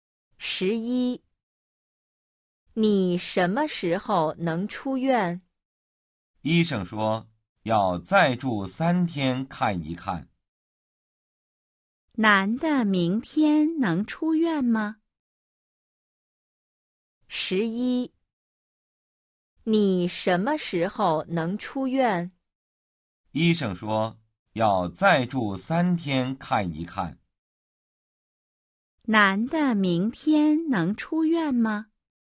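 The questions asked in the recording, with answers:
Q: 男的明天能出院吗?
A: 不能,还要再住三天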